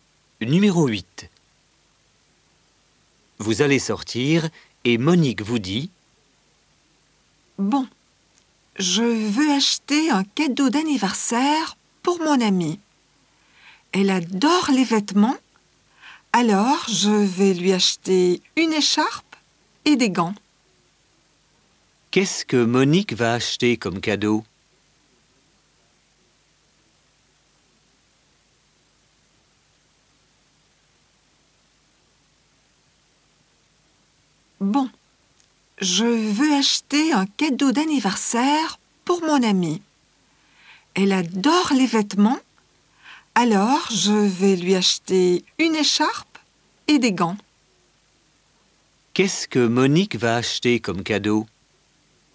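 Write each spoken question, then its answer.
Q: Qu'est-ce que Monique va acheter comme cadeau?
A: Une écharpe et des gants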